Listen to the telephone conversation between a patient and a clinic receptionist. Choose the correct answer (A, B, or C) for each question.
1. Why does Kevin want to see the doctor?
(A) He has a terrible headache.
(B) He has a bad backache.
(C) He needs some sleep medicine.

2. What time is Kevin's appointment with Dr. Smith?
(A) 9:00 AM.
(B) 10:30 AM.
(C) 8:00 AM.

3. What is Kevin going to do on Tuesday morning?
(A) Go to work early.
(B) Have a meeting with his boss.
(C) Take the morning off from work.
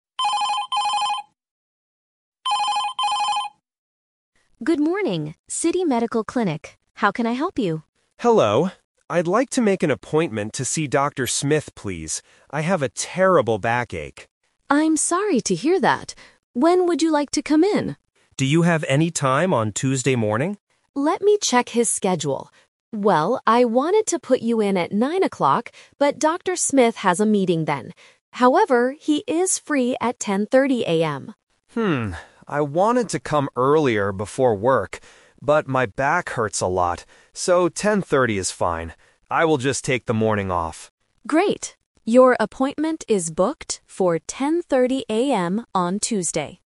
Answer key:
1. He has a bad backache.
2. 10:30 AM.
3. Take the morning off from work.

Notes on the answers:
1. Kevin clearly states, "I have a terrible backache." Trap A is wrong: A headache is a different health problem not mentioned in the audio. Trap C is wrong: Medicine is a plausible reason to visit a doctor, but it is not the reason Kevin gives.
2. The receptionist confirms at the end, "Your appointment is booked for 10:30 AM on Tuesday." Trap A is wrong (The Twist): The receptionist wanted to give him the 9:00 time, but the doctor has a meeting. Trap C is wrong: 8:00 AM is not mentioned in the conversation.
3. Because the appointment is at 10:30, Kevin decides, "I will just take the morning off." Trap A is wrong: Kevin says "I wanted to come earlier before work", but he changes his mind because his back hurts too much. Trap B is wrong: Dr. Smith has a meeting at 9:00, not Kevin.

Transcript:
Receptionist: Good morning, City Medical Clinic. How can I help you?
Kevin: Hello. I'd like to make an appointment to see Dr. Smith, please. I have a terrible backache.
Receptionist: I'm sorry to hear that. When would you like to come in?
Kevin: Do you have any time on Tuesday morning?
Receptionist: Let me check his schedule. Well, I wanted to put you in at 9:00, but Dr. Smith has a meeting then.
Kevin: Hmm, I wanted to come earlier before work. But my back hurts a lot, so 10:30 is fine. I will just take the morning off.
Receptionist: Great. Your appointment is booked for 10:30 AM on Tuesday.

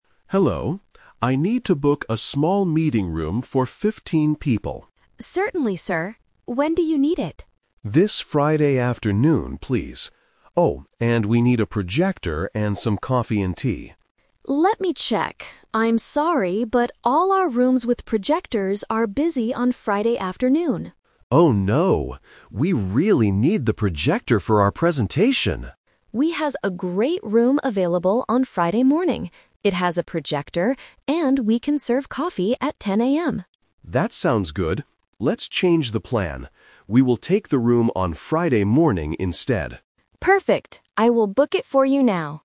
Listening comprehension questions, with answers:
Listen to a conversation between an event manager and a hotel staff member. Choose the correct answer (A, B, or C) for each question.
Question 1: What does the manager want to have in the meeting room?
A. A computer and water.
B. A large TV and sandwiches.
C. A projector and coffee.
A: A projector and coffee.

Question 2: What is the problem with Friday afternoon?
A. The rooms with projectors are not available.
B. The hotel does not serve coffee in the afternoon.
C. The meeting room is too small for 15 people.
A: The rooms with projectors are not available.

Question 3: What do they finally agree to do? (The Twist)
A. Book the room for Friday afternoon without a projector.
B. Book the room for Friday morning.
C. Look for a meeting room in another hotel.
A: Book the room for Friday morning.

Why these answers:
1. The manager clearly lists his requests: "Oh, and we need a projector and some coffee and tea." Trap: Options A and B are plausible things to request for a meeting, but they are never mentioned in the audio.
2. The staff member explains the problem: "...all our rooms with projectors are busy on Friday afternoon." ("Busy" means not available). Trap: Option B is a trap because "coffee" and "afternoon" are mentioned, but that's not the problem. Option C is incorrect; the manager asks for a room for 15 people, but the staff never says it is too small.
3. This is the Twist. The manager originally wanted Friday afternoon, but to get the projector, he changes his plan. He says, "We will take the room on Friday morning instead." Trap: Option A is what he planned to do regarding the time, but he refuses to do it without a projector ("We really need the projector"). Option C is a plausible real-world solution, but he decides to just change the time at the same hotel.

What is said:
Manager: Hello. I need to book a small meeting room for 15 people.
Staff: Certainly, sir. When do you need it?
Manager: This Friday afternoon, please. Oh, and we need a projector and some coffee and tea.
Staff: Let me check... I'm sorry, but all our rooms with projectors are busy on Friday afternoon.
Manager: Oh no. We really need the projector for our presentation.
Staff: We have a great room available on Friday morning. It has a projector, and we can serve coffee at 10 AM.
Manager: That sounds good. Let's change the plan. We will take the room on Friday morning instead.

